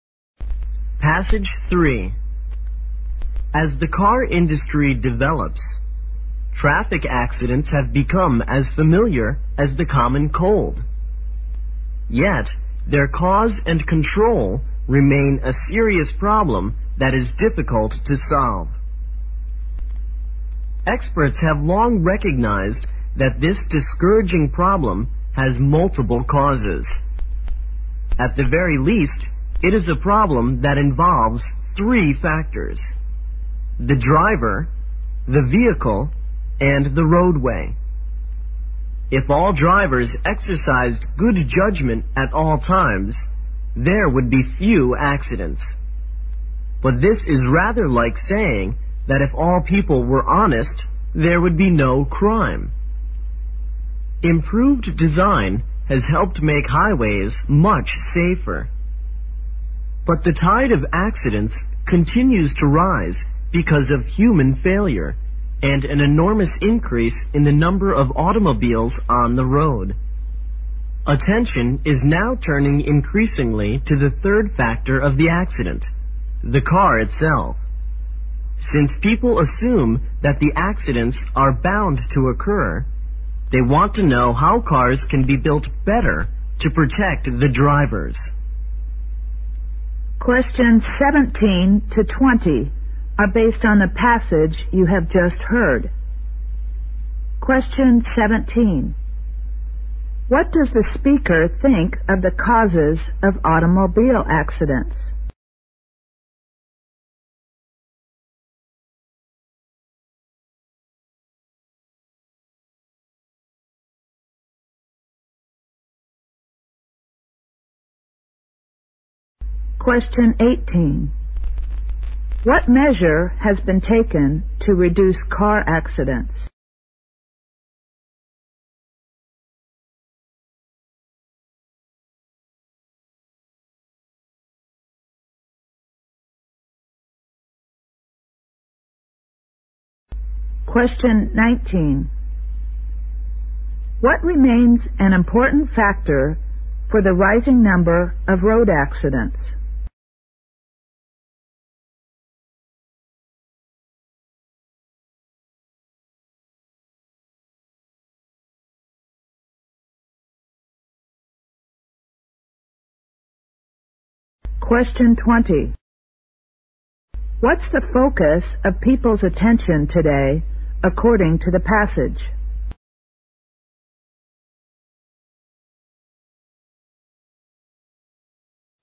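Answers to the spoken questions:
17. They have multiple causes: the driver, the vehicle and the roadway
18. Improved highway design
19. Human failure, along with a huge increase in the number of cars
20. The car itself: how cars can be built better to protect drivers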